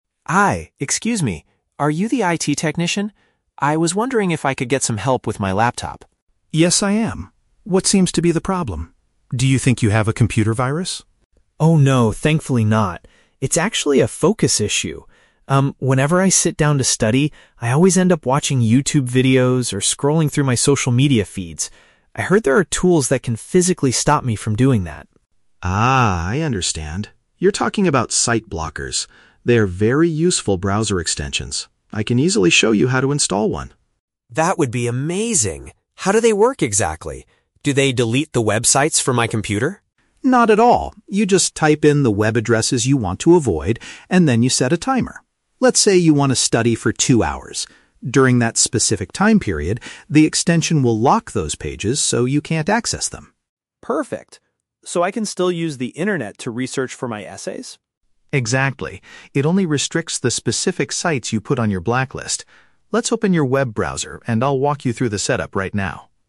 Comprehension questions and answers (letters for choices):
Listen to the conversation between a student and an IT technician, then choose the correct answer (A, B, or C) for each question.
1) Why does Sam approach the IT technician today?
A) To get help removing a dangerous virus from his system.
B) To find a way to prevent himself from visiting distracting websites.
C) To ask for instructions on how to fix his broken laptop screen.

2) According to the technician, how does the site blocker tool function?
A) It completely deletes social media platforms from the computer.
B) It turns off the laptop's Wi-Fi connection after two hours.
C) It temporarily stops the user from opening selected web pages.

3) What is Sam still able to do while the blocking tool is active?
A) Look for academic information online to complete his assignments.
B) Watch educational videos on YouTube for his classes.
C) Message his classmates using an offline communication app.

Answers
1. B
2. C
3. A

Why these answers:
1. Sam says he has a "focus issue" and wants a tool to physically stop him from watching YouTube and checking social media. Option B perfectly paraphrases this as preventing himself from visiting distracting websites. Option A is a trap; the IT technician asks if it is a virus, but Sam immediately says, "Oh, no, thankfully not." Option C is plausible for an IT visit, but it is never mentioned in the audio.
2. Chris explains that the extension will "lock those pages so you can't access them" during a "specific time period." Option C paraphrases this accurately. Option A is a trap; Sam asks if the tool will "delete the websites," but Chris clearly says, "Not at all." Option B is not mentioned.
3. Sam asks, "So I can still use the internet to research for my essays?" and Chris confirms ("Exactly"). Option A paraphrases researching for essays as looking for "academic information online." Option B is a trap; YouTube is specifically mentioned as one of the distracting sites Sam wants to block, so he won't be watching videos on it. Option C is not mentioned.

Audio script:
Sam: Hi, excuse me. Are you the IT technician? I was wondering if I could get some help with my laptop.
Chris: Yes, I am. What seems to be the problem? Do you think you have a computer virus?
Sam: Oh, no, thankfully not. It's actually a focus issue. Um, whenever I sit down to study, I always end up watching YouTube videos or scrolling through my social media feeds. I heard there are tools that can physically stop me from doing that.
Chris: Ah, I understand. You're talking about site blockers. They are very useful browser extensions. I can easily show you how to install one.
Sam: That would be amazing. How do they work exactly? Do they delete the websites from my computer?
Chris: Not at all. You just type in the web addresses you want to avoid, and then you set a timer. Let's say you want to study for two hours. During that specific time period, the extension will lock those pages so you can't access them.
Sam: Perfect. So I can still use the internet to research for my essays?
Chris: Exactly. It only restricts the specific sites you put on your blacklist. Let's open your web browser and I'll walk you through the setup right now.